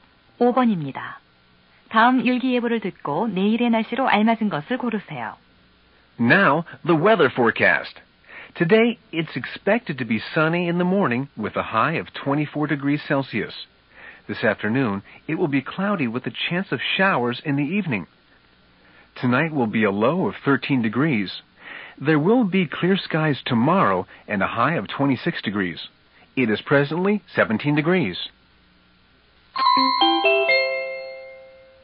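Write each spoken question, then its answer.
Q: 다음 일기예보를 듣고 내일의 날씨로 알맞은 것을 고르세요.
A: 맑음, 최고 26도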